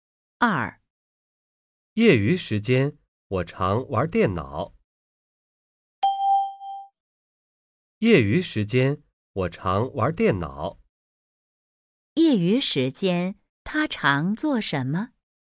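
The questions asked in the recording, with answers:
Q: 业余时间,他常做什么?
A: 玩电脑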